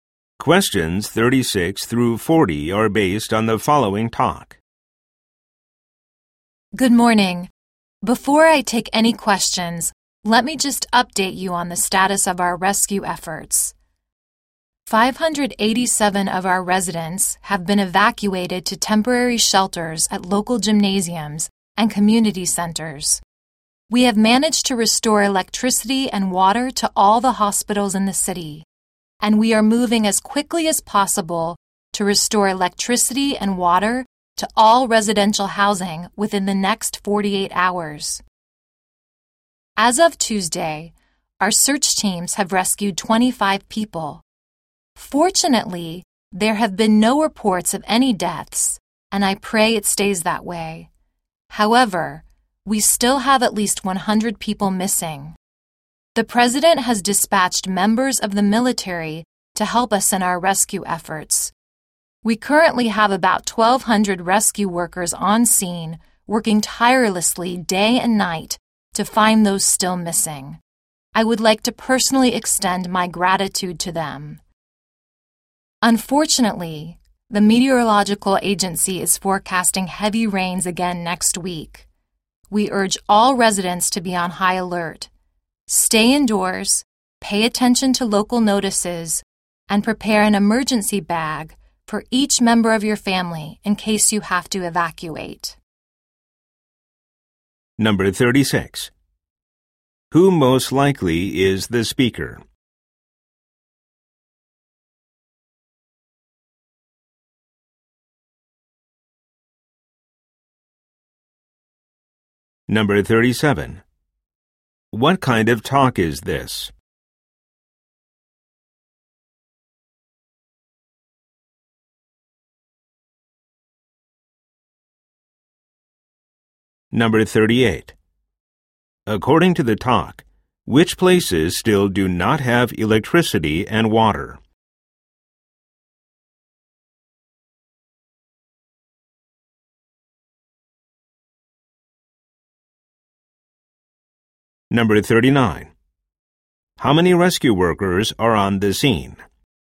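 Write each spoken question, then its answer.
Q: What kind of talk is this?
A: A press briefing on disaster rescue efforts

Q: According to the talk, which places still do not have electricity and water?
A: Residential housing

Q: How many rescue workers are on the scene?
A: About 1,200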